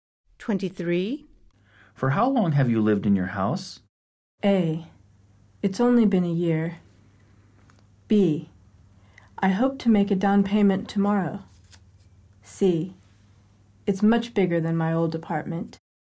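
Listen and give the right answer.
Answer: A: It's only been a year.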